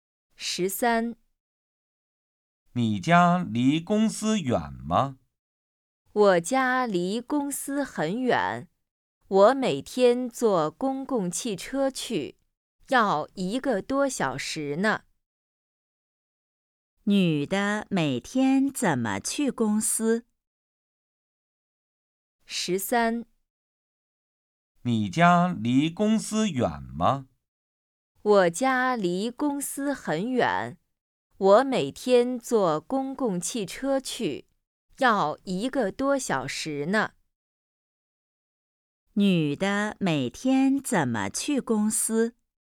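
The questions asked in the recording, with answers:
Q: 女的每天怎么去公司?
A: 坐公共汽车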